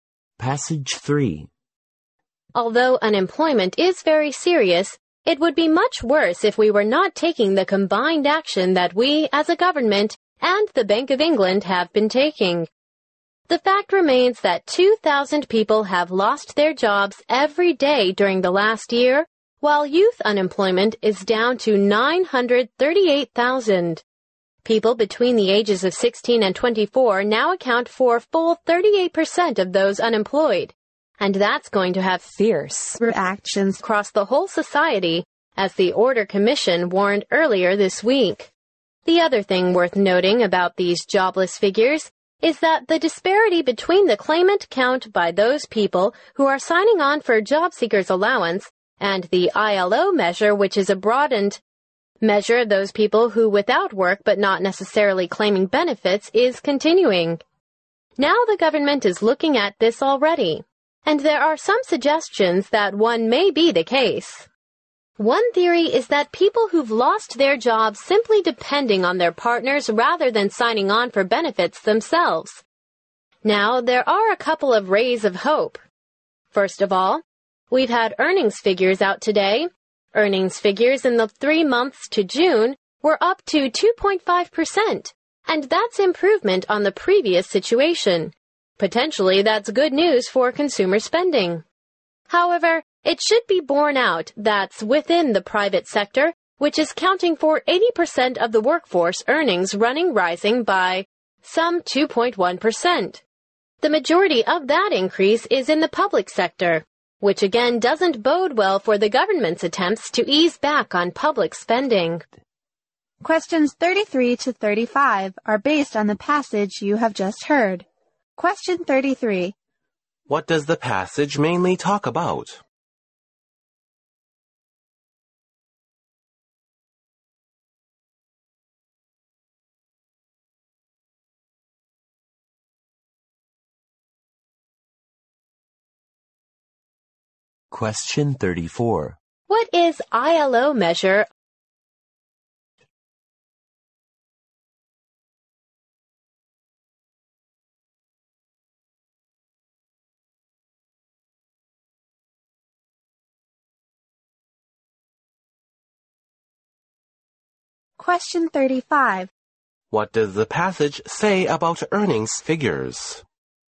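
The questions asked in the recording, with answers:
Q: What does the passage mainly talk about?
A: Unemployment in Britain

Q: What is ILO measure?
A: A broader measure of people without work who are not necessarily claiming benefits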